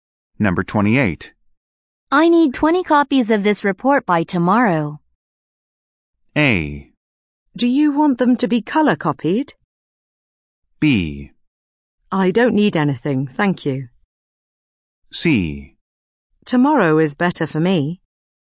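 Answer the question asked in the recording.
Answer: A: Do you want them to be color copied?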